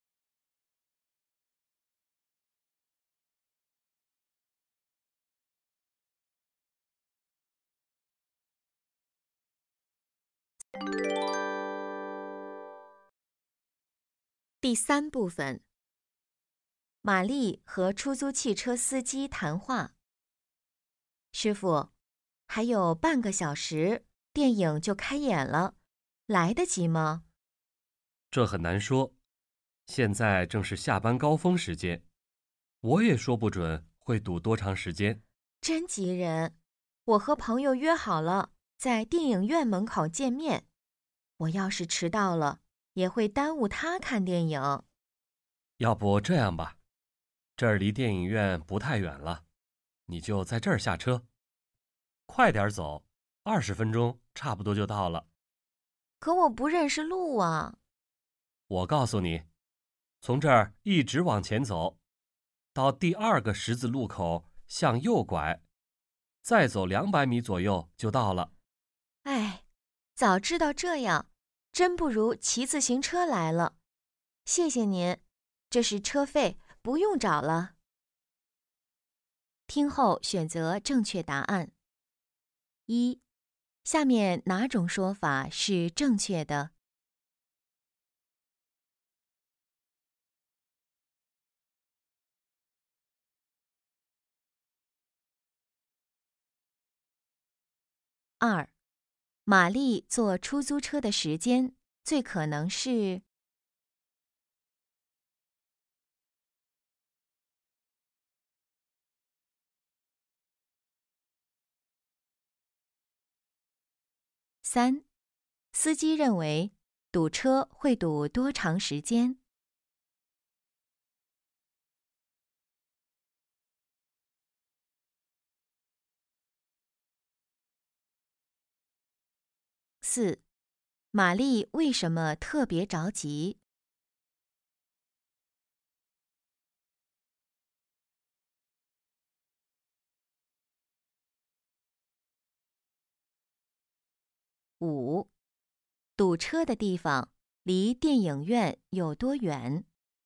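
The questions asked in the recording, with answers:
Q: 玛丽为什么特别着急?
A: 她和朋友约好在电影院门口见面,迟到会耽误朋友看电影

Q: 堵车的地方离电影院有多远?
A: 不太远,走路20分钟左右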